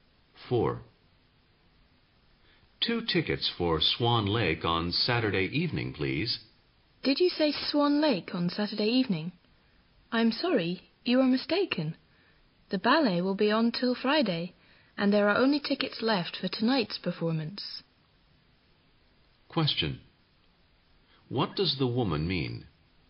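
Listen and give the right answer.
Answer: There are no Saturday tickets; only tonight's are left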